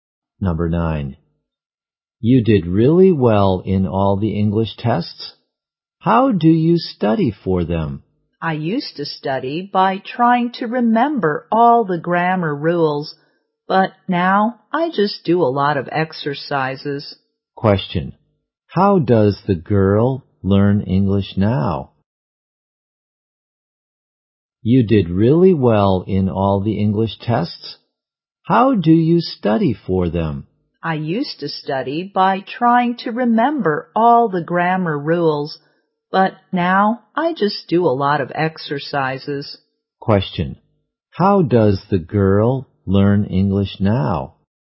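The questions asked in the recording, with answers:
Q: How does the girl learn English now?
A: By doing a lot of exercises.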